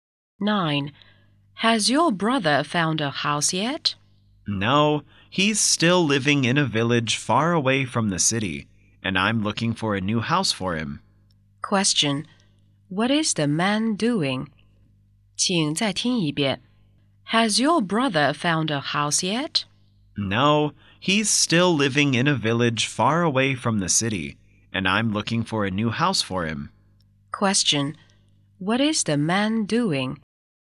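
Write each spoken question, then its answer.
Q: What is the man doing?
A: Looking for a new house for his brother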